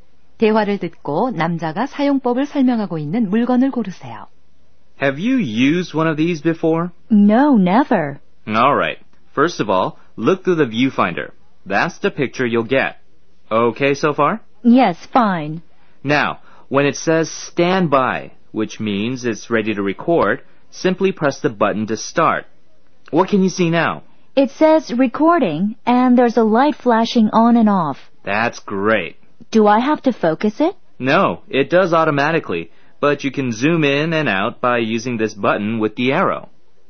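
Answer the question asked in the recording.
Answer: 비디오 카메라(캠코더)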